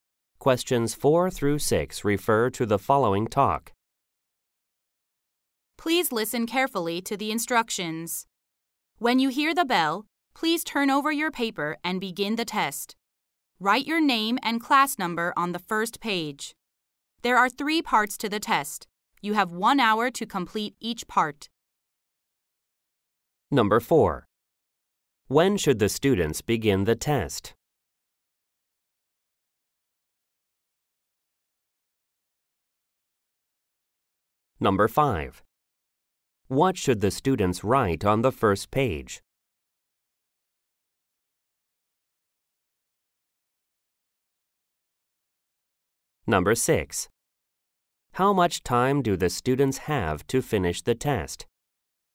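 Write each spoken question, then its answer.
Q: When should the students begin the test?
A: When they hear the bell

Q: What should the students write on the first page?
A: Their name and class number

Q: How much time do the students have to finish the test?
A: 3 hours (1 hour per part)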